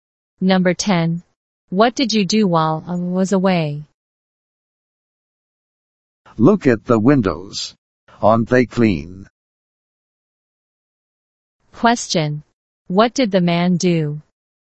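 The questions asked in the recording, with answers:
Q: What did the man do?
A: He cleaned the windows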